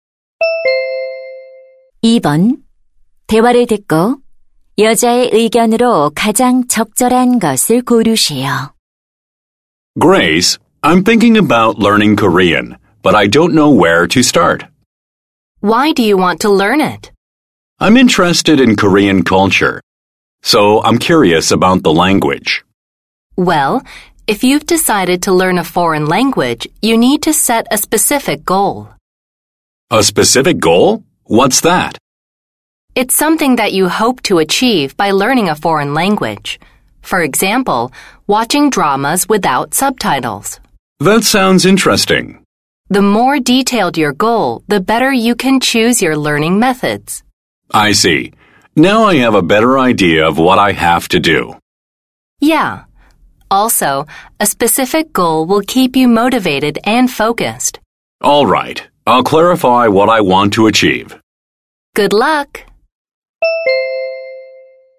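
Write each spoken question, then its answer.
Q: 대화를 듣고 여자의 의견으로 가장 적절한 것을 고르시오.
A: 외국어를 배울 때는 구체적인 목표를 세워야 한다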